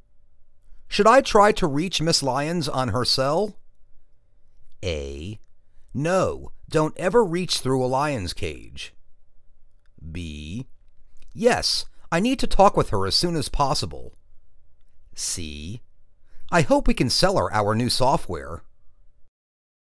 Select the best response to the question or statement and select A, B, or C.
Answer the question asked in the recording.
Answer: Yes, I need to talk with her as soon as possible.